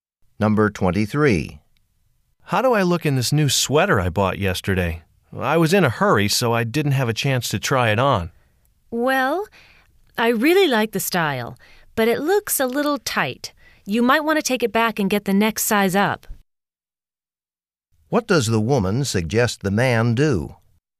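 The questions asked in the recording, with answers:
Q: What does the woman suggest the man do?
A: Exchange the sweater for a larger size.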